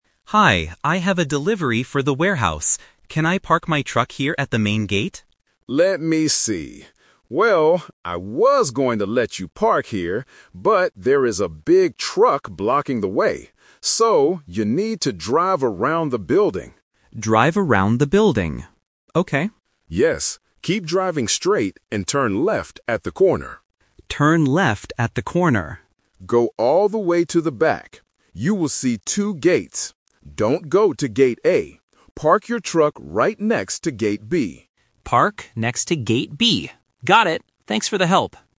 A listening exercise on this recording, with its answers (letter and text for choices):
Listen to the conversation between a delivery driver and a security guard. Choose the correct answer (A, B, or C) for each question.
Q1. Why can't the driver park at the main gate?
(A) Because he has to go to Gate A.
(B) Because a big truck is blocking the way.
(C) Because the main gate is closed today.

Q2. Which way should the driver turn at the corner?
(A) Turn left.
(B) Turn right.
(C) Go straight.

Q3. Where exactly should the driver park his truck?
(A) At the main gate.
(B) Next to Gate A.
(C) Next to Gate B.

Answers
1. (B) Because a big truck is blocking the way.
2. (A) Turn left.
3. (C) Next to Gate B.

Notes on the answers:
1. The Key: The security guard explains the situation clearly: "there is a big truck blocking the way." The Trap: Option (A) uses a keyword ("Gate A") mentioned later in the audio, but it is not the reason he can't park at the front. Option (C) is a plausible reason in real life, but it is not mentioned.
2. The Key: The guard's instruction is to "turn left at the corner." The Trap: Option (C) is a trap because the guard does say "Keep driving straight," but that is before reaching the corner.
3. The Key: The guard gives the final instruction: "Park your truck right next to Gate B." The Trap: Option (A) is where the driver wanted to park initially. Option (B) is explicitly warned against when the guard says, "Don't go to Gate A."

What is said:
Driver: Hi, I have a delivery for the warehouse. Can I park my truck here at the main gate?
Security Guard: Let me see. Well, I was going to let you park here, but there is a big truck blocking the way. So, you need to drive around the building.
Driver: Drive around the building. Okay.
Security Guard: Yes. Keep driving straight and turn left at the corner.
Driver: Turn left at the corner.
Security Guard: Go all the way to the back. You will see two gates. Don't go to Gate A. Park your truck right next to Gate B.